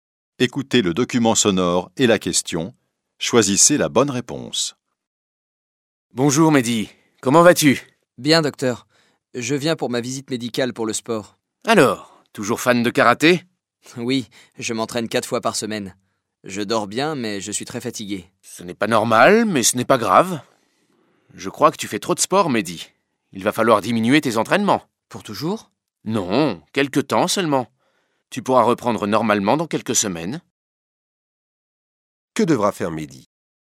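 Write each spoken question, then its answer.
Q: Que devra faire Mehdi?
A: Diminuer ses entraînements de karaté pendant quelques semaines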